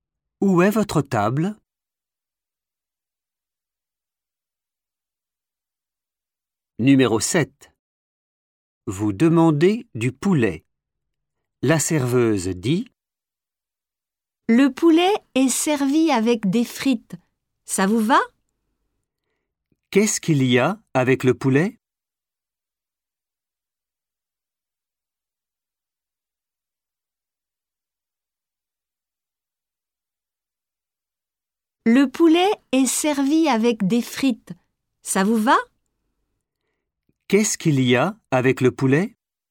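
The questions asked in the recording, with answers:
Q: « Qu'est-ce qu'il y a avec le poulet ? »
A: des frites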